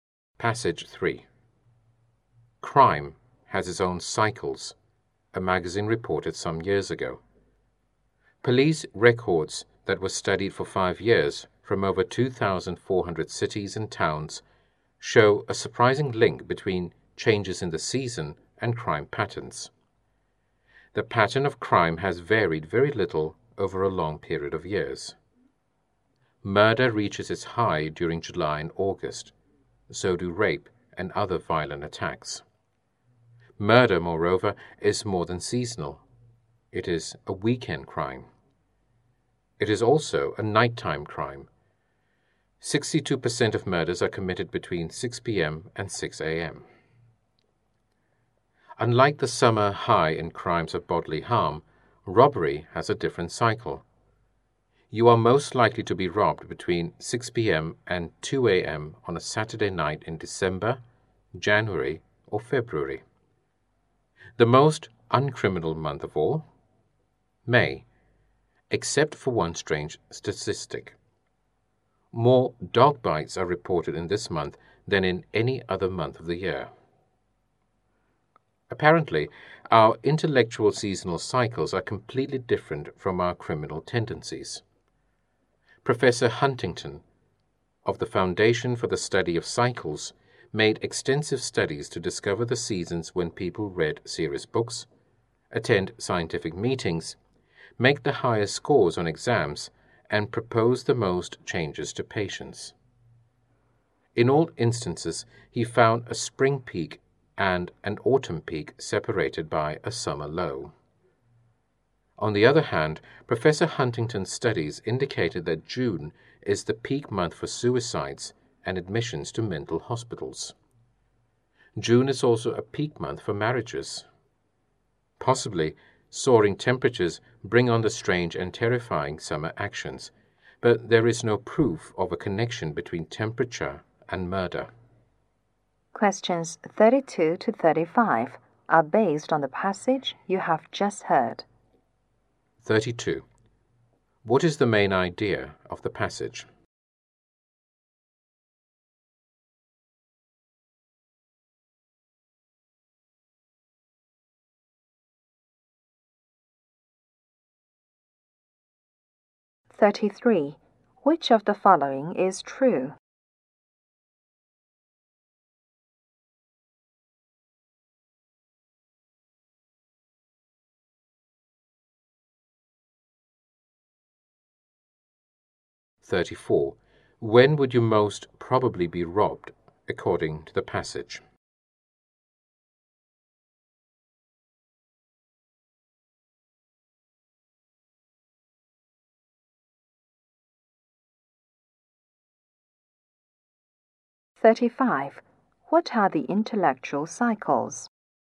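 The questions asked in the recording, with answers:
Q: What is the main idea of the passage?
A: Crime and human behavior follow seasonal cycles

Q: When would you most probably be robbed, according to the passage?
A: Between 6 p.m. and 2 a.m. on a Saturday night in winter

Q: What are the intellectual cycles?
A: A spring peak and an autumn peak separated by a summer low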